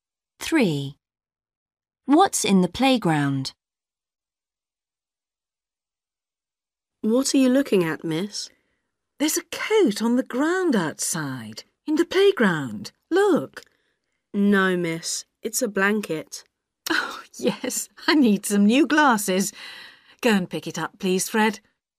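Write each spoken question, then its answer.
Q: What's in the playground?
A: a blanket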